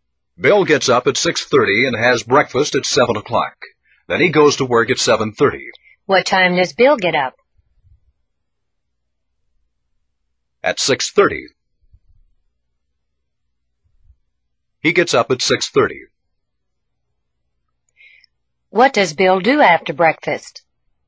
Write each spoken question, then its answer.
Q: What does Bill do after breakfast?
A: Goes to work. He goes to work.